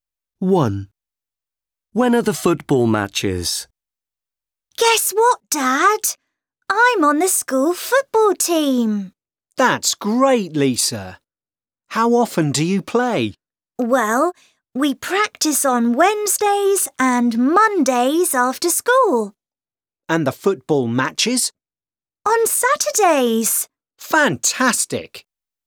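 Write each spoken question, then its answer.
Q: When are the football matches?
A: On Saturdays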